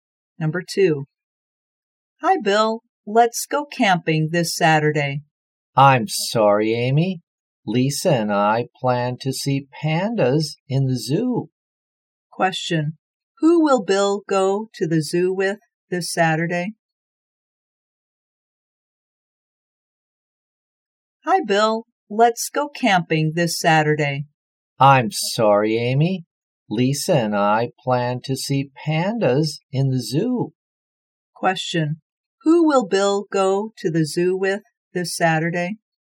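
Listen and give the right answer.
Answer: Lisa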